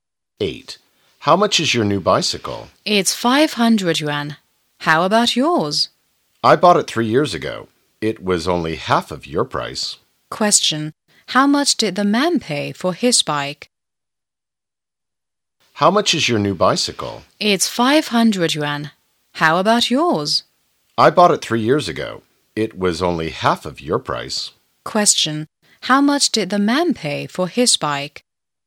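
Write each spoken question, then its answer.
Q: How much did the man pay for his bike?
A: 250 yuan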